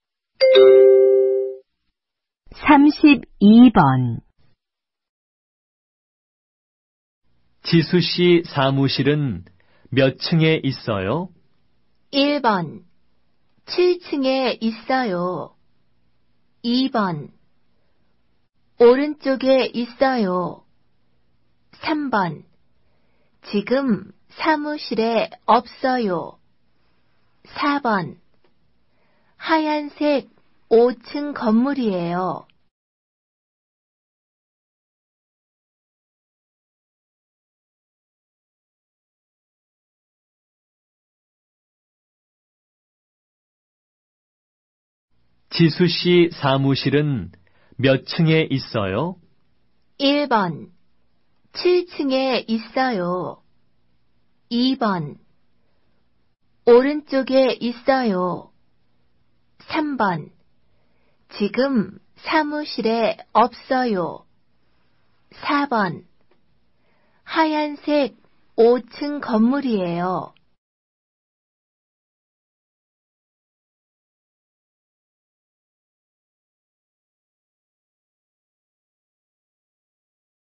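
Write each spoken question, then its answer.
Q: 지수 씨 사무실은 몇 층에 있어요?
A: 1: 7층에 있어요.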